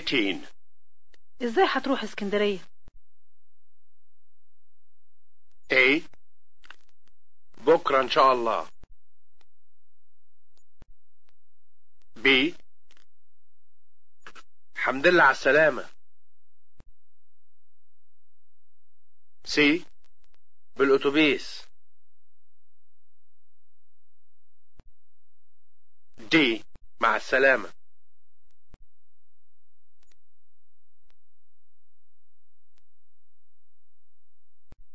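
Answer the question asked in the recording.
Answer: C: بالاوتوبيس.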